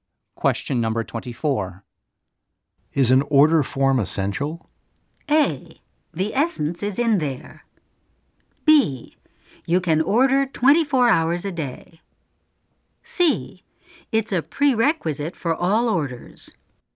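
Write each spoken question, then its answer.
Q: Is an order form essential?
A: C: It's a prerequisite for all orders.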